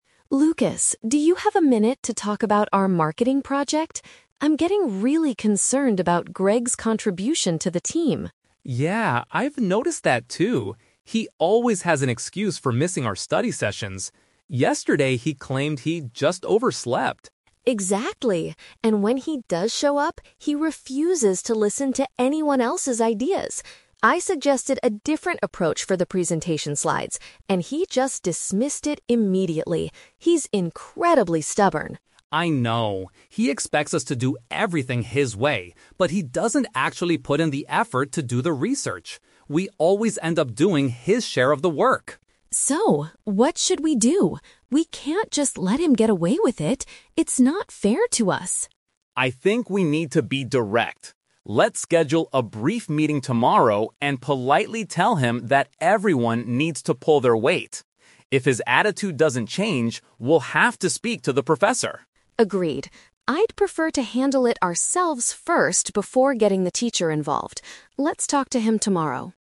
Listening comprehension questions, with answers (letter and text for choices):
Listen to a conversation between two university students, Emma and Lucas. For each question, choose the correct answer A, B, or C.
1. What is the main problem with Greg's work ethic?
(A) He misses meetings because he has a part-time job.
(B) He does not do his fair share of the group assignment.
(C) He constantly argues with the marketing professor.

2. How does Greg react to other people's suggestions?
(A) He ignores them and only wants to follow his own ideas.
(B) He accepts them quickly if they are creative.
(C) He asks the teacher to decide which idea is the best.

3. What do Emma and Lucas decide to do NEXT?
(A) Ask their teacher to remove Greg from the group immediately.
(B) Finish all the remaining work by themselves to avoid arguments.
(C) Have an honest conversation with Greg about his performance.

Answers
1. (B) He does not do his fair share of the group assignment.
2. (A) He ignores them and only wants to follow his own ideas.
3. (C) Have an honest conversation with Greg about his performance.

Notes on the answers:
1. Lucas says that Greg "doesn't actually put in the effort" and they always "end up doing his share of the work." Option B is a perfect paraphrase of this situation. Trap Alert: Option A is a trap. Greg does miss meetings, but his excuse was that he "overslept," not because he had a job. Option C is never mentioned.
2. Emma says Greg "refuses to listen to anyone else's ideas" and "dismissed it immediately," calling him "stubborn." Lucas adds that Greg expects them to "do everything his way." Option A summarizes this behavior. Trap Alert: Option B is the exact opposite of what Greg does. Option C is a trap because the word "teacher/professor" is mentioned later in the audio, but not related to choosing ideas.
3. Lucas suggests they "schedule a brief meeting tomorrow and politely tell him that everyone needs to pull their weight" (which means to do their fair share of work). Emma agrees to "handle it ourselves first." Trap Alert: Option A is a trap. They mention speaking to the professor, but only if his attitude doesn't change. Their next step is to talk to Greg directly. Option B is what they are currently doing, but they decide to stop doing it.

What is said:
Emma: Lucas, do you have a minute to talk about our marketing project? I'm getting really concerned about Greg's contribution to the team.
Lucas: Yeah, I've noticed that too. He always has an excuse for missing our study sessions. Yesterday he claimed he just overslept.
Emma: Exactly. And when he does show up, he refuses to listen to anyone else's ideas. I suggested a different approach for the presentation slides, and he just dismissed it immediately. He's incredibly stubborn.
Lucas: I know. He expects us to do everything his way, but he doesn't actually put in the effort to do the research. We always end up doing his share of the work.
Emma: So, what should we do? We can't just let him get away with it. It's not fair to us.
Lucas: I think we need to be direct. Let's schedule a brief meeting tomorrow and politely tell him that everyone needs to pull their weight. If his attitude doesn't change, we'll have to speak to the professor.
Emma: Agreed. I'd prefer to handle it ourselves first before getting the teacher involved. Let's talk to him tomorrow.